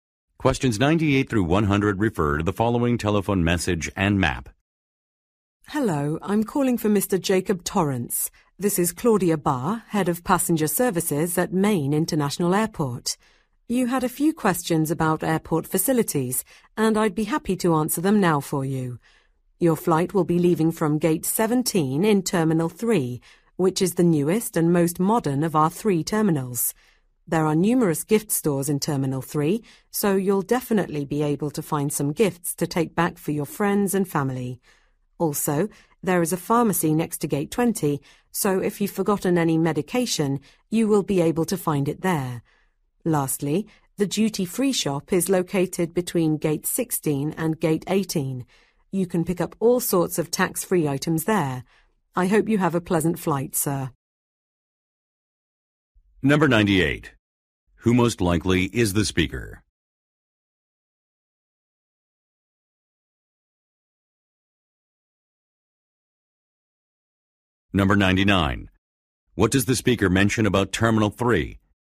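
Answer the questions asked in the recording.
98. An airport passenger services head
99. It is the newest terminal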